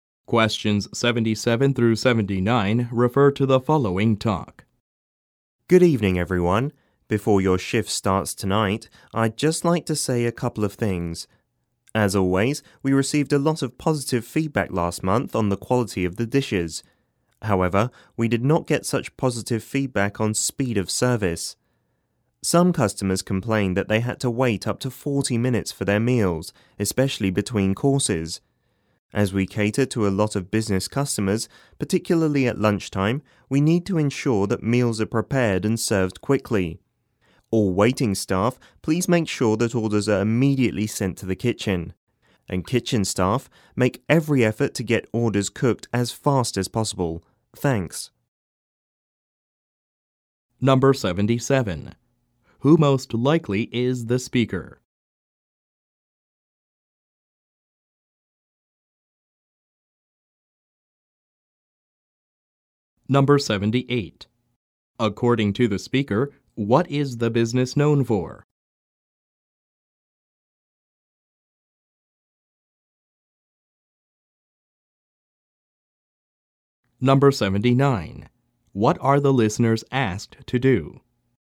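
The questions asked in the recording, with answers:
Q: Who most likely is the speaker?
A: A restaurant manager

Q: According to the speaker, what is the business known for?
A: The quality of its dishes

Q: What are the listeners asked to do?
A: Work faster: send orders to the kitchen right away and cook them as fast as possible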